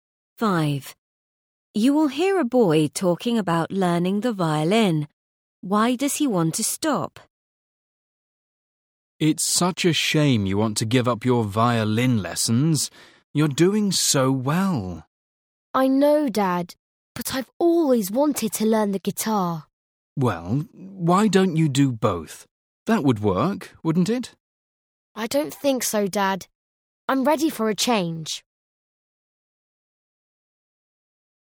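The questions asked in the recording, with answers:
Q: Why does he want to stop?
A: He wants a change and to learn the guitar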